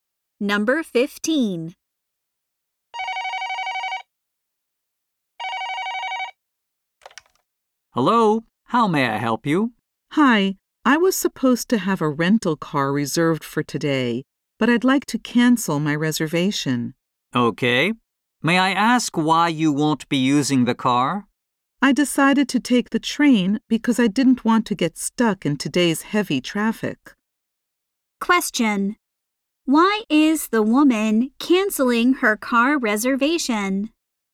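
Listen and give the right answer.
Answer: She decided to take the train to avoid heavy traffic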